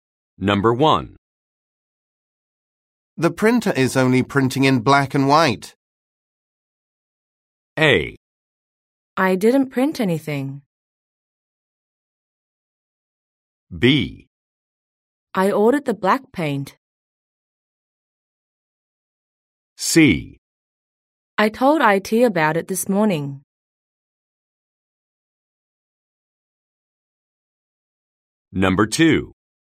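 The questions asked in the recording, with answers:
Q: The printer is only printing in black and white.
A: C: I told IT about it this morning.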